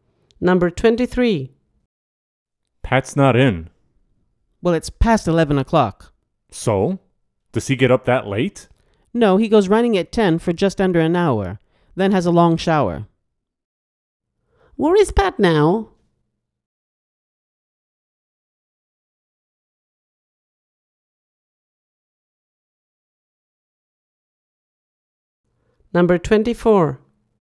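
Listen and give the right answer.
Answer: In the shower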